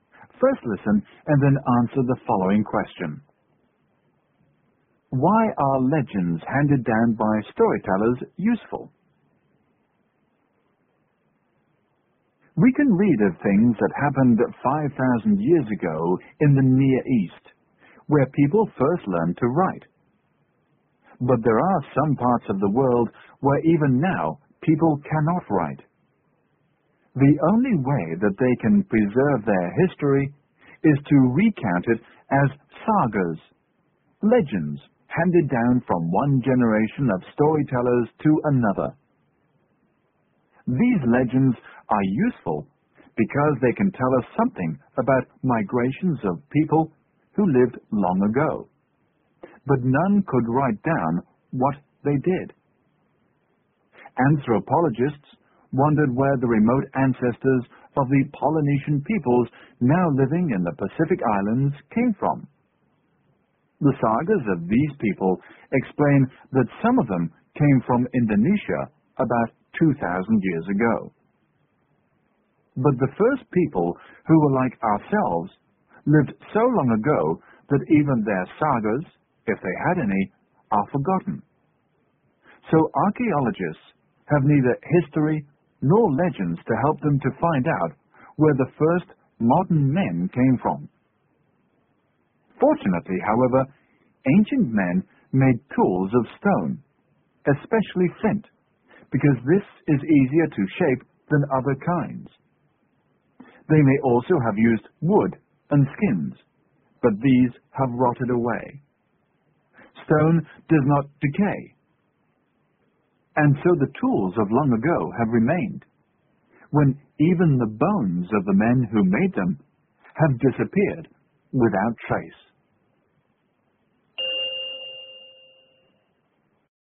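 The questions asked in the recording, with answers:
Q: Why are legends handed down by storytellers useful?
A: They can tell us something about migrations of people who lived long ago.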